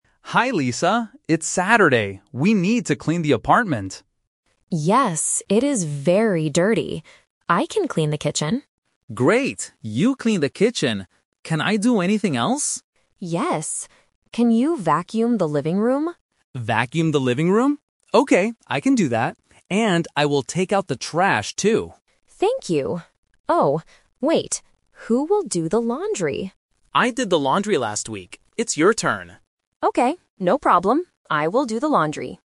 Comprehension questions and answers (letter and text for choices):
Listen to the conversation between two roommates and choose the correct answer (A, B, or C).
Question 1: Who will clean the kitchen?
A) Tom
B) Lisa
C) No one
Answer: B) Lisa

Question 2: What will Tom do in the living room?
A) Vacuum the living room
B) Clean the windows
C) Take out the trash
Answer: A) Vacuum the living room

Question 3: Who is going to do the laundry this week?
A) Tom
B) Lisa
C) Both of them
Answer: B) Lisa

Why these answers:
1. Lisa says, "I can clean the kitchen," and Tom repeats, "You clean the kitchen." Why the trap is wrong: Tom is mentioned in the conversation (A is a trap), but he is not the one who cleans the kitchen. Option C is not mentioned.
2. Lisa asks, "Can you vacuum the living room?" and Tom answers, "Vacuum the living room? Okay, I can do that." Why the trap is wrong: Tom also says he will "take out the trash" (C is a trap), but he doesn't do this in the living room. "Clean the windows" (B) is a plausible housework task but is never mentioned in the audio.
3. Tom says, "I did the laundry last week. It's your turn." Lisa agrees and says, "I will do the laundry." Why the trap is wrong: Tom is the trap (A). The audio mentions Tom doing the laundry, but he did it last week, not this week. Option C is not true because they do not do it together.

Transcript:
Tom: Hi, Lisa. It's Saturday. We need to clean the apartment.
Lisa: Yes, it is very dirty. I can clean the kitchen.
Tom: Great. You clean the kitchen. Can I do anything else?
Lisa: Yes. Can you vacuum the living room?
Tom: Vacuum the living room? Okay, I can do that. And I will take out the trash, too.
Lisa: Thank you. Oh, wait. Who will do the laundry?
Tom: I did the laundry last week. It's your turn.

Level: A1